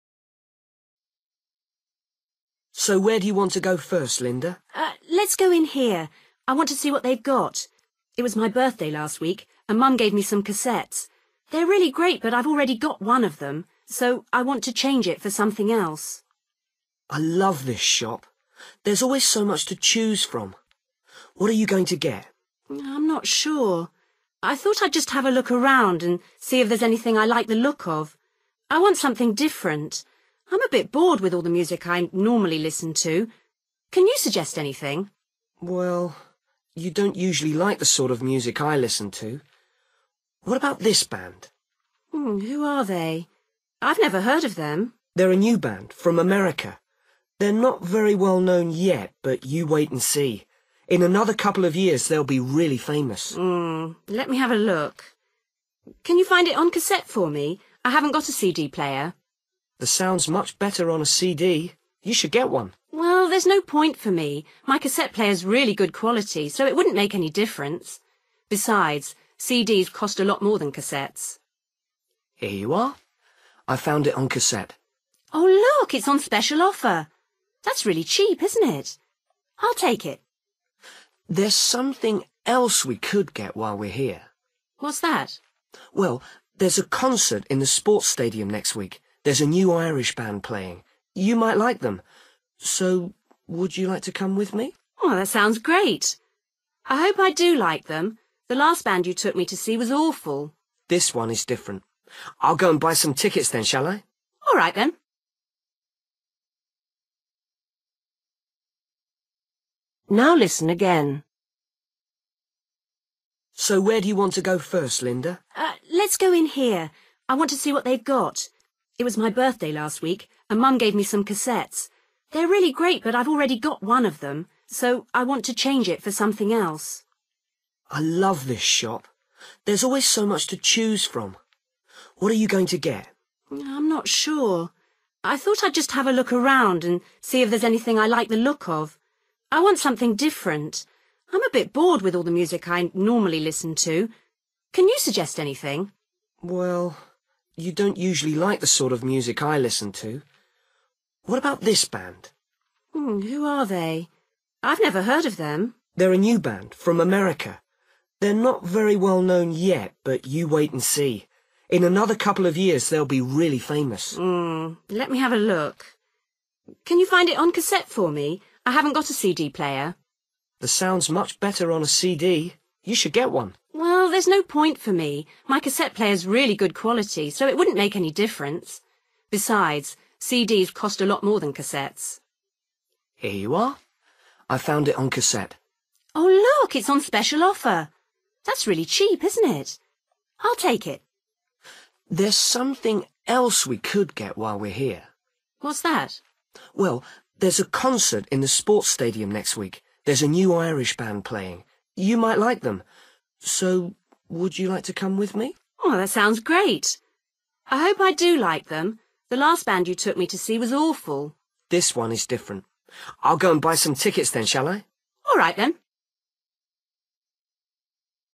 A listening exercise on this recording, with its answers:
Decide if each sentence is correct or incorrect.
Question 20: Linda wants to change a cassette because she dislikes it.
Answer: NO

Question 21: Linda already knows what she wants to get.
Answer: NO

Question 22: Frank recommends a famous band.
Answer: NO

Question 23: Linda is happy with her cassette player.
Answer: YES

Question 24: Linda thinks the price of the cassette is reasonable.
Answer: YES

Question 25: Linda has already seen the Irish band.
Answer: NO

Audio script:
Boy: So, where do you want to go first, Linda?
Girl: Let's go in here. I want to see what they've got. It was my birthday last week and Mum gave me some cassettes. They're really great but I've already got one of them so I want to change it for something else.
Boy: I love this shop, there's always so much to choose from. What are you going to get?
Girl: I'm not sure. I thought I'd just have a look around and see if there's anything I like the look of. I want something different. I'm a bit bored with all the music I normally listen to. Can you suggest anything?
Boy: Well, you don't usually like the sort of music I listen to. What about this band?
Girl: Who are they? I've never heard of them.
Boy: They're a new band from America. They're not very well known yet but you wait and see. In another couple of years they'll be really famous.
Girl: Mmm, let me have a look. Can you find it on cassette for me? I haven't got a CD player.
Boy: The sound's much better on a CD, you should get one.
Girl: Well, there's no point for me, my cassette player's really good quality, so it wouldn't make any difference. Besides CDs cost a lot more than cassettes.
Boy: Here you are. I've found it on cassette.
Girl: Oh look, it's on special offer. That's really cheap, isn't it? I'll take it.
Boy: There's something else we could get while we're here.
Girl: What's that?
Boy: Well, there's a concert in the sports stadium next week. There's a new Irish band playing. You might like them, so would you like to come with me?
Girl: That sounds great. I hope I do like them. The last band you took me to see was awful.
Boy: This one is different. I'll go and buy some tickets then, shall I?
Girl: All right then.

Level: B1